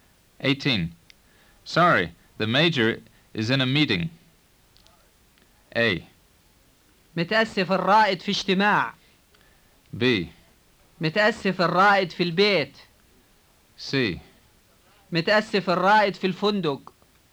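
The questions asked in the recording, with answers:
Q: Sorry, the major is in a meeting.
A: A: متأسف الرائد في اجتماع.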